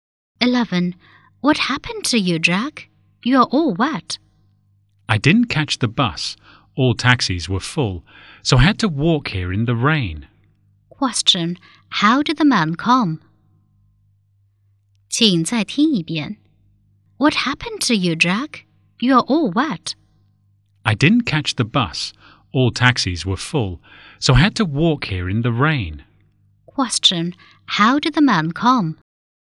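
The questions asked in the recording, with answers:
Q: Question, how did the man come?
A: On foot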